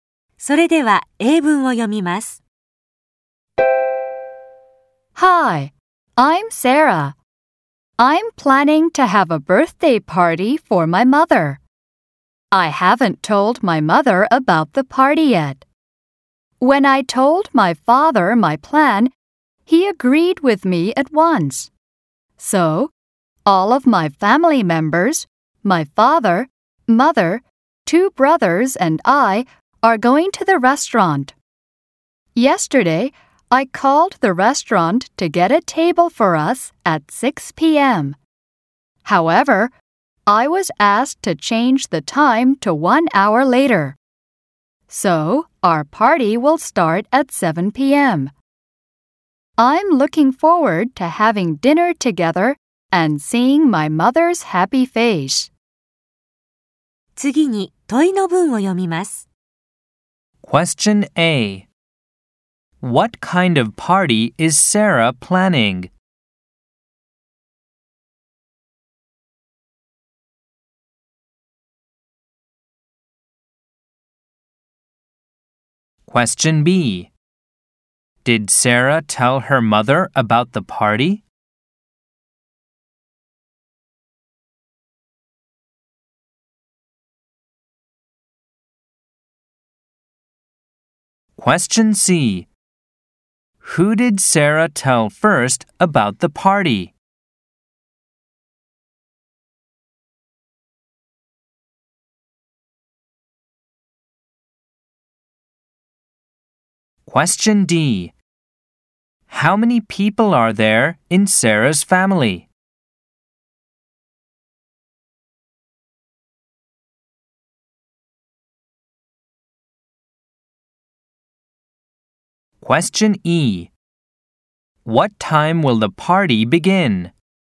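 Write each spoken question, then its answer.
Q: What kind of party is Sarah planning?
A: A birthday party for her mother

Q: Did Sarah tell her mother about the party?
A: No, she didn't

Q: Who did Sarah tell first about the party?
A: Her father

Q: How many people are there in Sarah's family?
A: Five

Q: What time will the party begin?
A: At 7 p.m.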